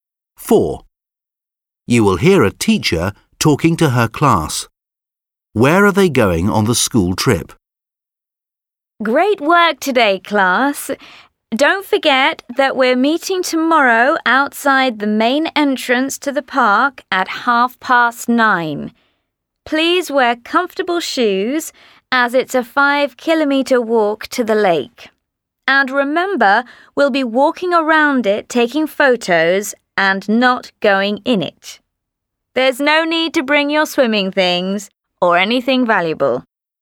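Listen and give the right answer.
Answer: To a lake in the park (walking around it)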